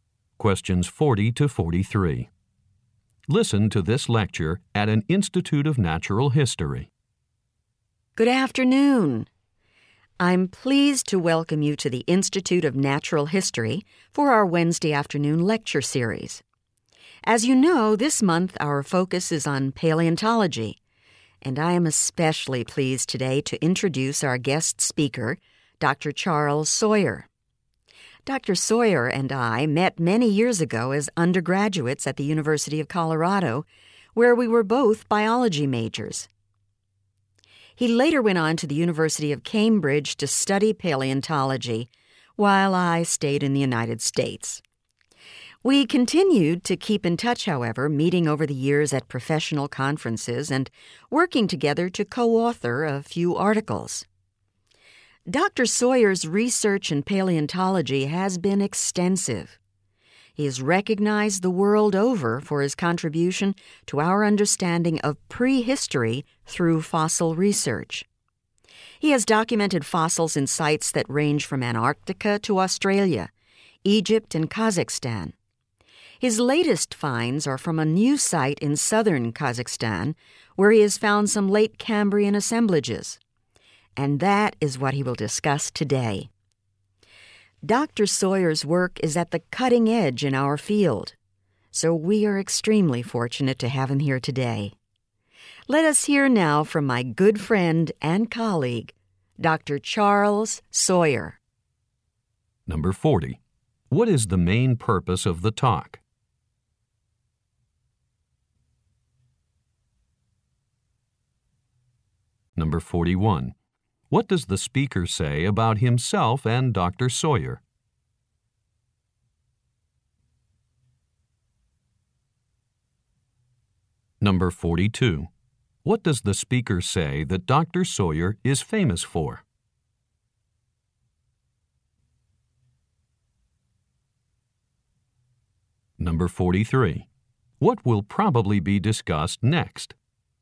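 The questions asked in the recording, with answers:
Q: What is the main purpose of the talk?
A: To introduce a guest speaker

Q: What does the speaker say that Dr.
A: His fossil research and contribution to understanding prehistory

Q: What will probably be discussed next?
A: His latest fossil finds from southern Kazakhstan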